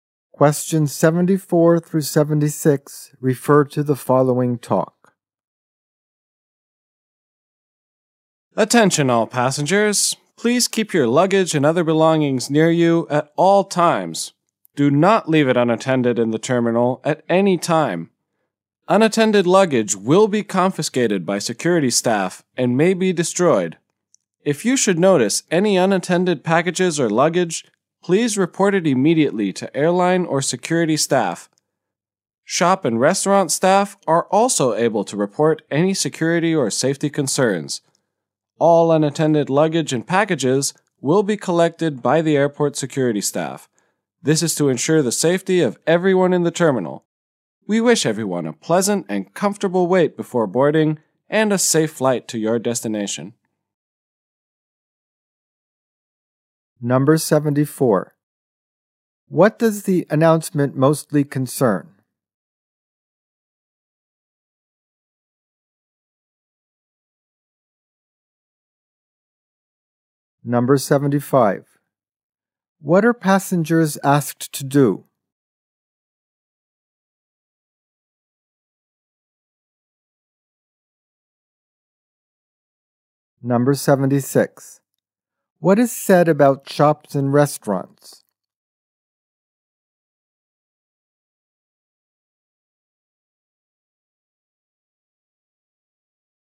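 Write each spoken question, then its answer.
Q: What does the announcement mostly concern?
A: Unattended luggage / security

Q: What are passengers asked to do?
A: Keep their luggage near them at all times

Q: What is said about shops and restaurants?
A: Their staff can report security or safety concerns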